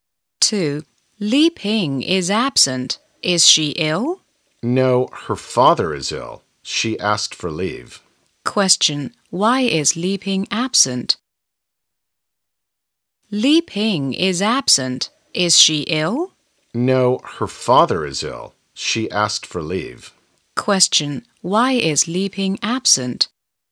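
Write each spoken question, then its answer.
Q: Why is Li Ping absent?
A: Because her father is ill.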